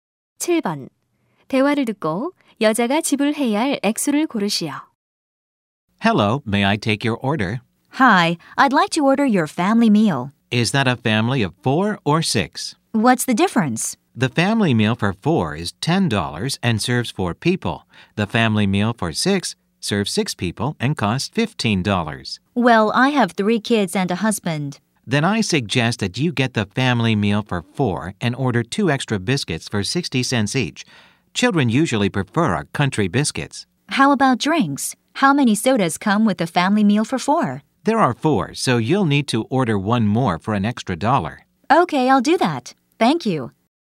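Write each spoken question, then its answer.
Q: 대화를 듣고 여자가 지불해야 할 액수를 고르시오.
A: $12.20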